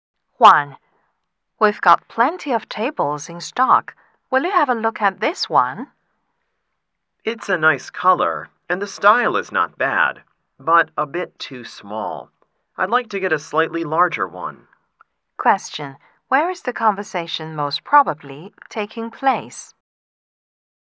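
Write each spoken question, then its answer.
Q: Where is the conversation most probably taking place?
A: In a furniture store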